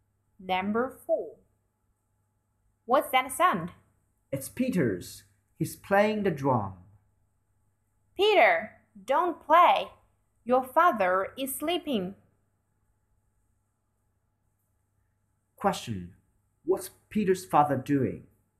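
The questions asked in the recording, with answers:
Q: What's Peter's father doing?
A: He's sleeping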